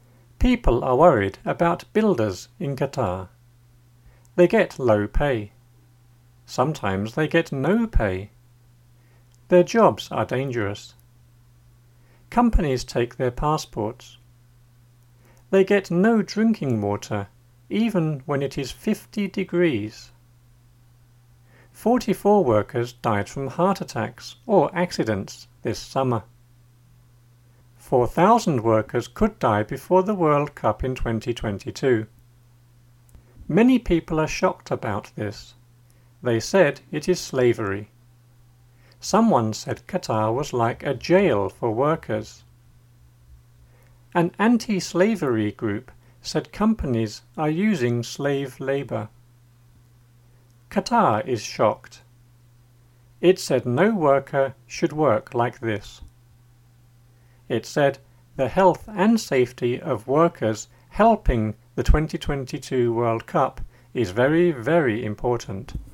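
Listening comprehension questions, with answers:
LISTEN AND FILL IN THE GAPS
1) (1) ___________________ about builders in Qatar.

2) Sometimes they (2) ___________________.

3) Companies (3) ___________________.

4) They get no drinking water, even (4) ___________________ degrees.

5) 44 workers (5) ___________________ attacks or accidents this summer.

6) 4,000 workers (6) ___________________ the World Cup in 2022.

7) Many people are (7) ___________________.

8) Someone said Qatar was (8) ___________________ for workers.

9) An (9) ___________________ said companies are using slave labour.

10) It said (10) ___________________ work like this.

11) It said (11) ___________________ safety of workers helping the 2022 World Cup is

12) (12) ___________________.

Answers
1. People are worried
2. get no pay
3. take their passports
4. when it is 50
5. died from heart
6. could die before
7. shocked about this
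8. like a jail
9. anti-slavery group
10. no worker should
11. the health and
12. very, very important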